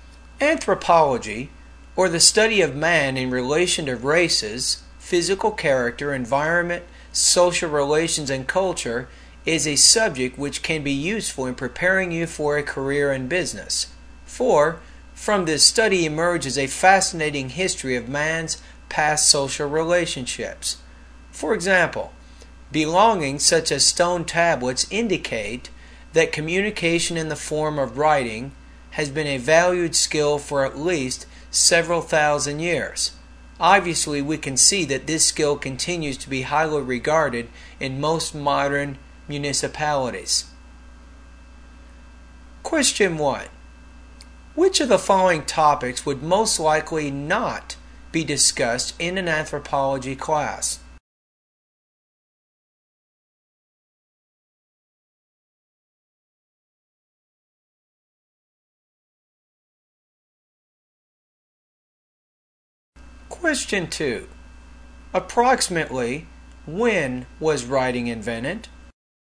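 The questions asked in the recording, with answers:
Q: Approximately, when was writing invented?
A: At least several thousand years ago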